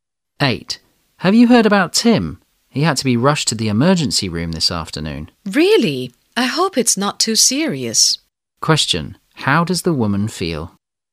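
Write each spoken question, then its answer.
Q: How does the woman feel?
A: Worried about Tim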